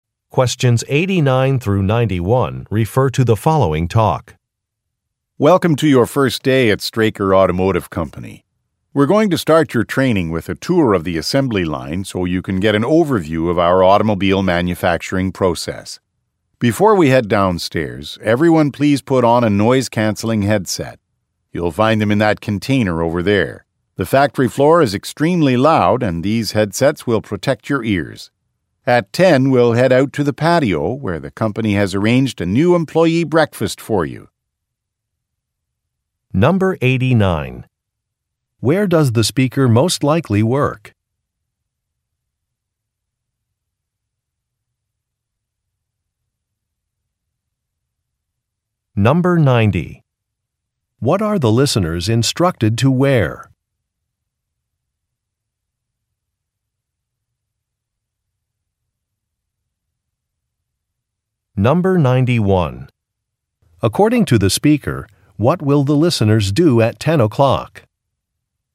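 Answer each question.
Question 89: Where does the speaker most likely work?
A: At a manufacturing plant

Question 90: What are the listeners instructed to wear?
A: Ear protection

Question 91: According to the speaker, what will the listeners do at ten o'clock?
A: Have a meal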